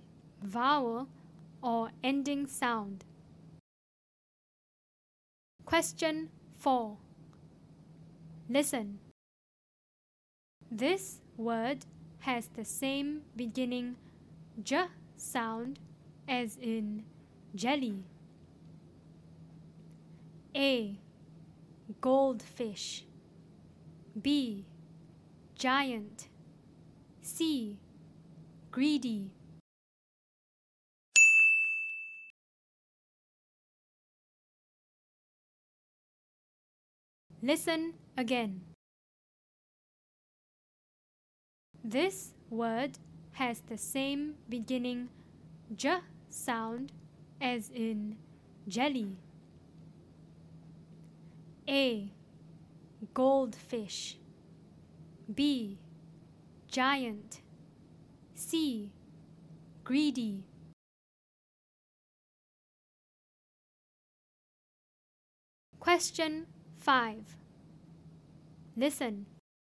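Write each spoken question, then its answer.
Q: This word has the same beginning j sound as in jelly.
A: B: Giant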